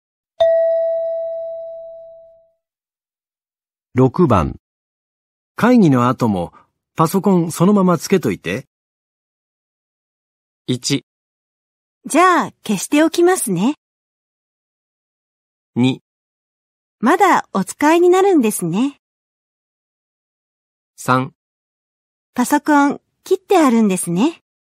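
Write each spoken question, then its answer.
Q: 会議の後もパソコンそのままつけといて。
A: 2: まだお使いになるんですね。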